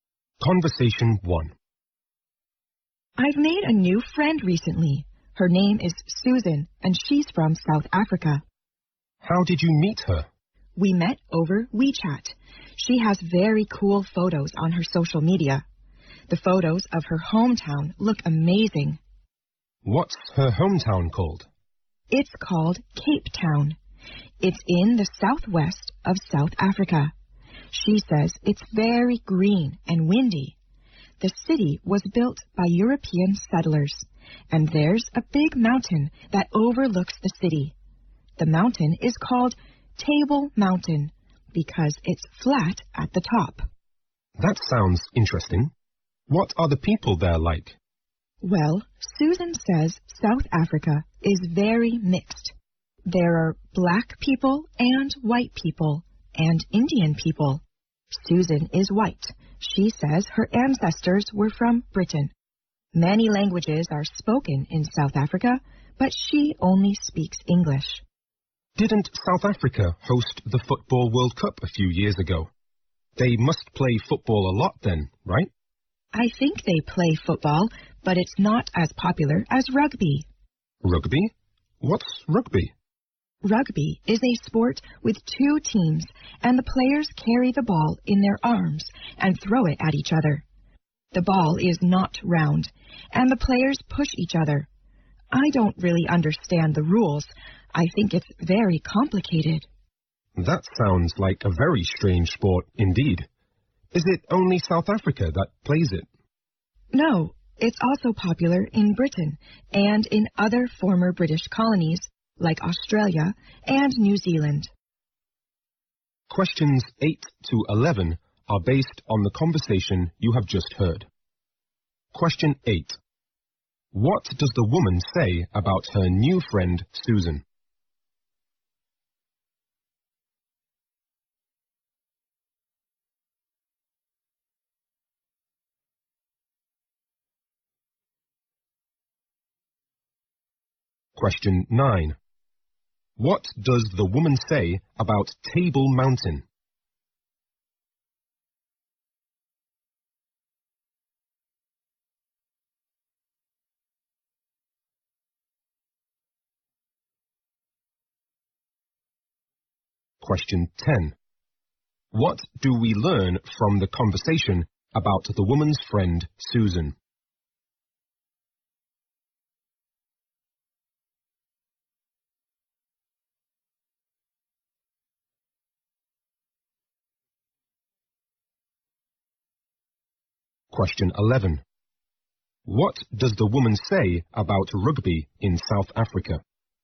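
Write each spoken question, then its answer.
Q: What does the woman say about her new friend, Susan?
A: They met over WeChat; Susan has very cool photos on social media.

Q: What does the woman say about Table Mountain?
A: It is flat at the top.

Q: What do we learn from the conversation about the woman's friend, Susan?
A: She is white, her ancestors were British, and she speaks only English.

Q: What does the woman say about rugby in South Africa?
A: It is more popular than football.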